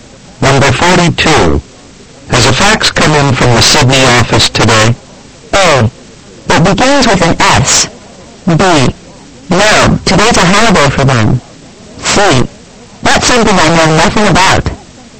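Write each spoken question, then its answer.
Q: Has a fax come in from the Sydney office today?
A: B: No, today's a holiday for them.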